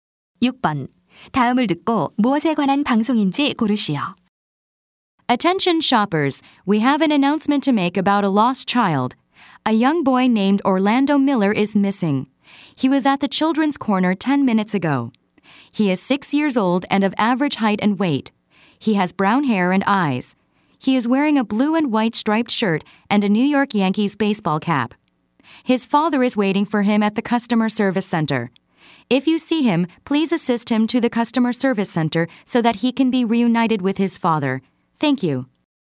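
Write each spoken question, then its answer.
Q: 다음을 듣고 무엇에 관한 방송인지 고르시오.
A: 미아 찾기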